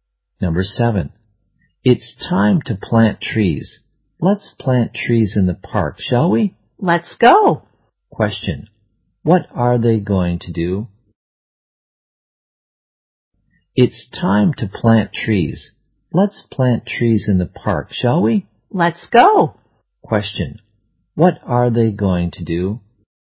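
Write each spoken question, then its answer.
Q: What are they going to do?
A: Plant trees in the park.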